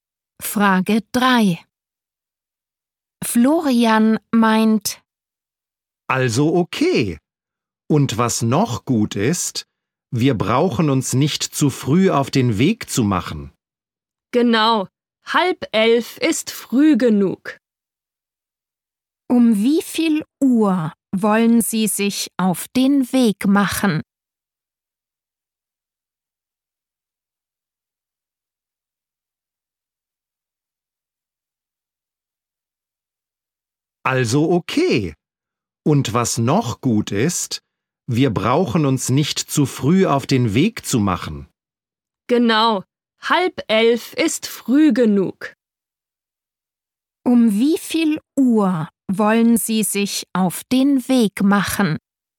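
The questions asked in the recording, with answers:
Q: Um wie viel Uhr wollen Sie sich auf den Weg machen?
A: Um 10:30 Uhr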